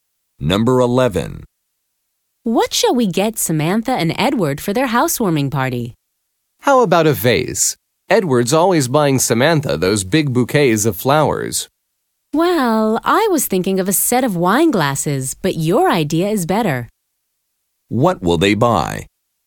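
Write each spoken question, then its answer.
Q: What will they buy?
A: A vase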